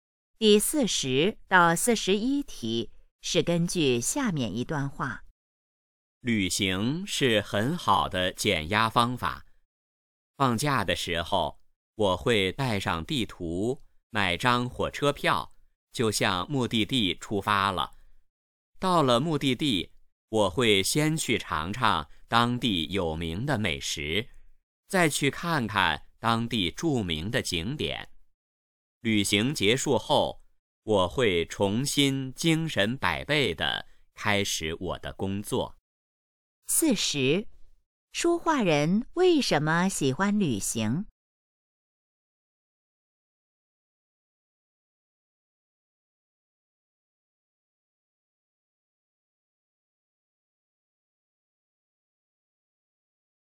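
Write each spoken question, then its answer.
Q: 说话人为什么喜欢旅行?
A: 能减压

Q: 说话人到目的地后先做什么?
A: 尝当地有名的美食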